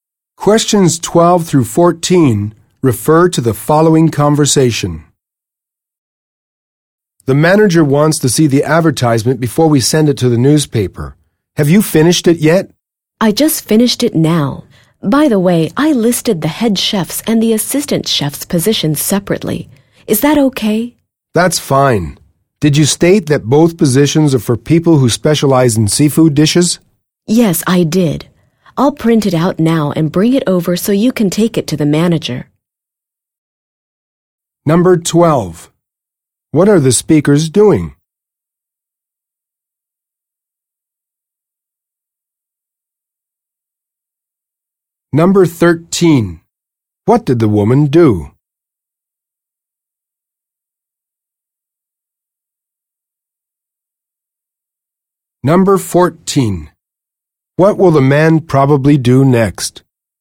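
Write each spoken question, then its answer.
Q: What are the speakers doing?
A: Preparing a job advertisement for chef positions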